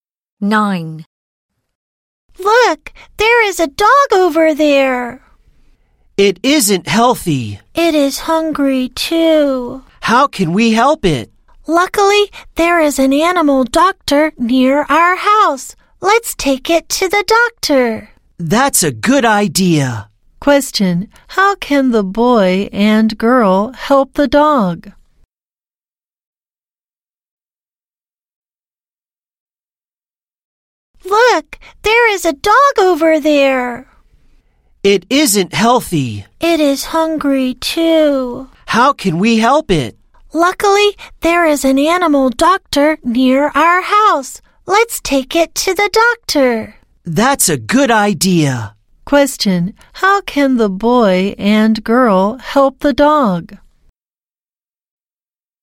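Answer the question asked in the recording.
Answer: Take it to the animal doctor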